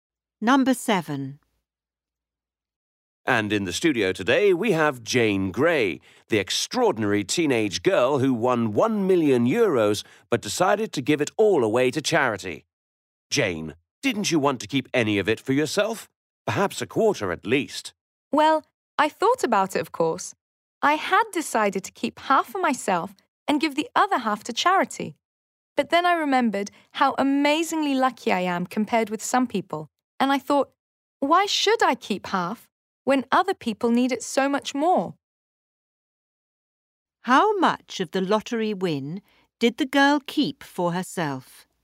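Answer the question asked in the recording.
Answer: None of it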